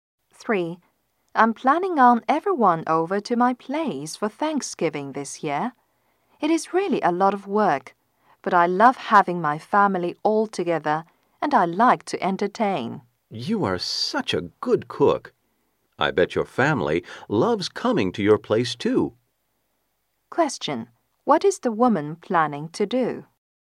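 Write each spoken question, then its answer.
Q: What is the woman planning to do?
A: Have her family over for Thanksgiving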